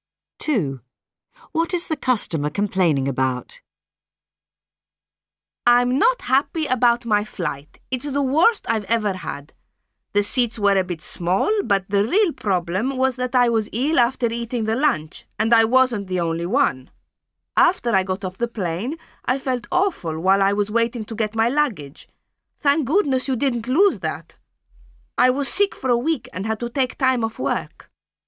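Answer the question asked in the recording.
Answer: The lunch on the flight made him ill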